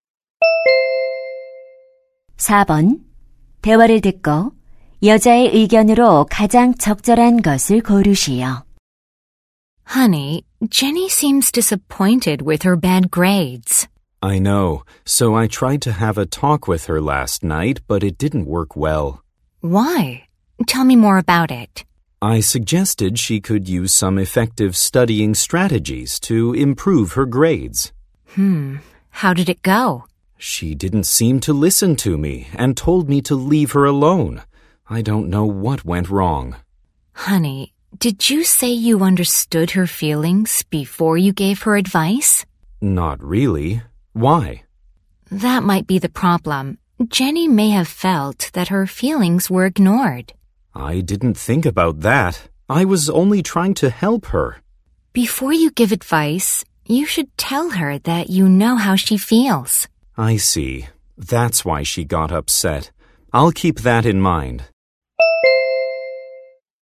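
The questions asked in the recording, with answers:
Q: 여자의 의견으로 가장 적절한 것을 고르시오.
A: 조언하기 전에 자녀의 감정을 이해한다고 말해 주어야 한다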